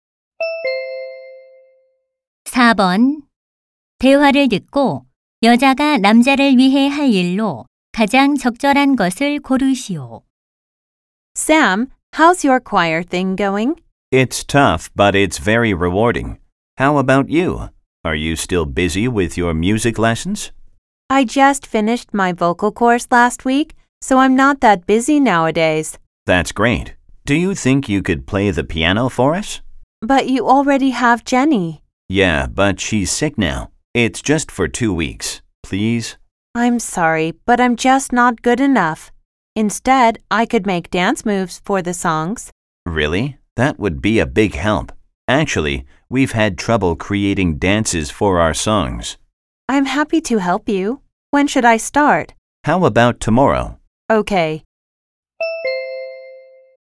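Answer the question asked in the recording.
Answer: 합창곡에 맞는 춤 동작 만들기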